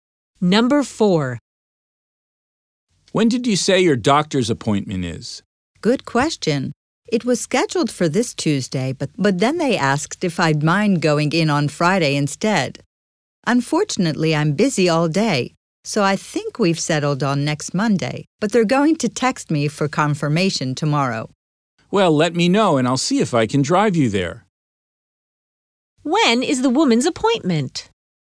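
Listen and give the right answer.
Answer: Next Monday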